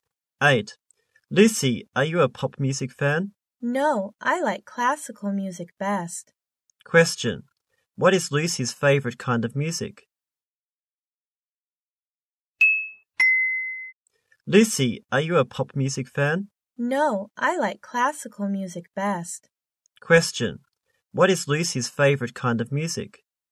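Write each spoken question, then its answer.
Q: What is Lucy's favorite kind of music?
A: Classical music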